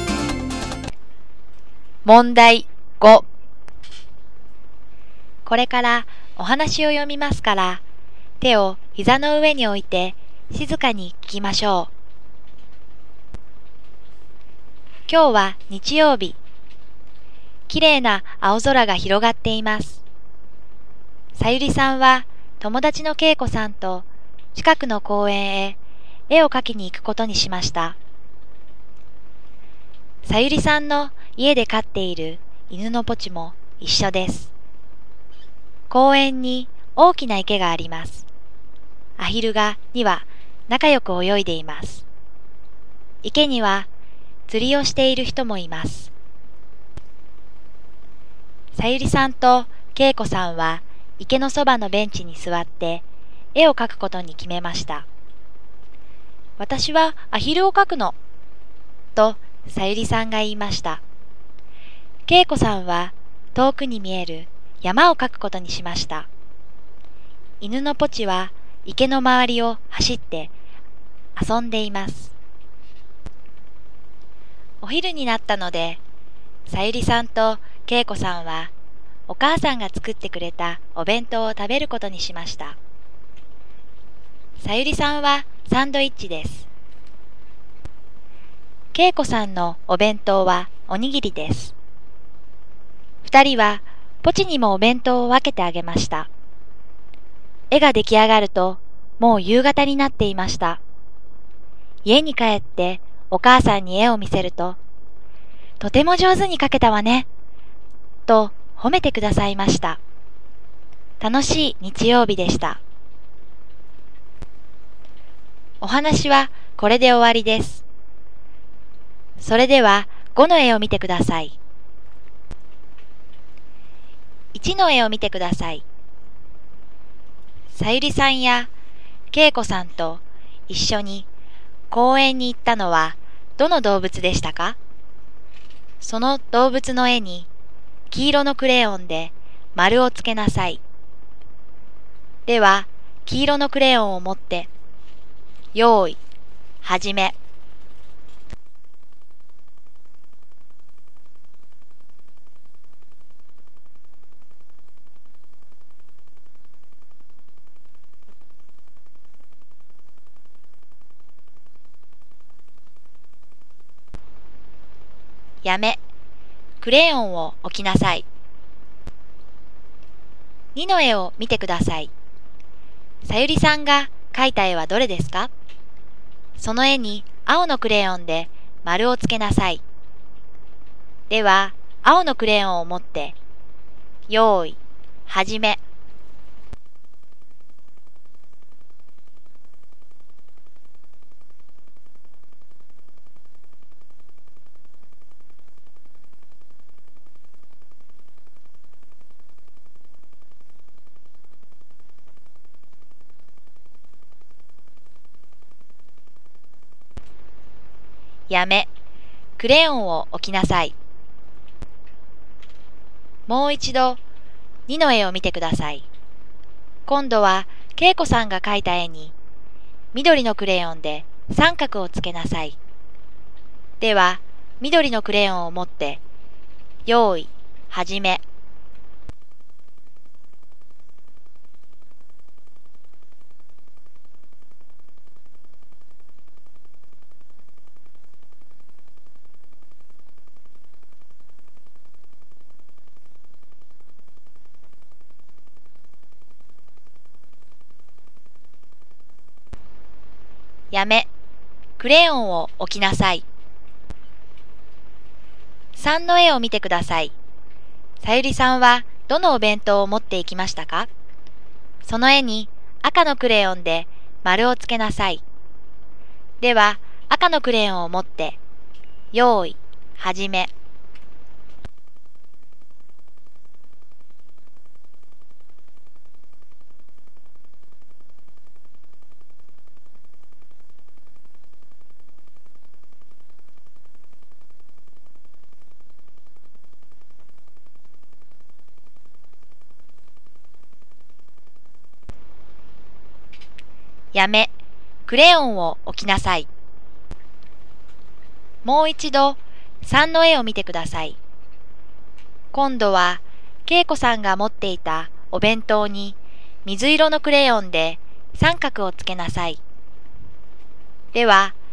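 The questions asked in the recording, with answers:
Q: さゆりさんやけいこさんと一緒に公園に行ったのはどの動物でしたか?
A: 犬(ポチ)

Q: さゆりさんが描いた絵はどれですか?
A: アヒル

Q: 今度は、けいこさんが描いた絵に、緑のクレヨンで三角をつけなさい。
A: 遠くに見える山

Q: さゆりさんはどのお弁当を持っていきましたか?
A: サンドイッチ

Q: 今度は恵子さんが持っていたお弁当に水色のクレヨンで三角をつけなさい。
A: おにぎり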